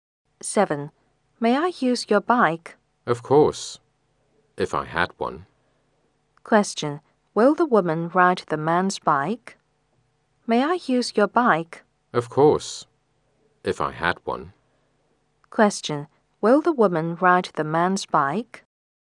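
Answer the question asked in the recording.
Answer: No, the man doesn't have a bike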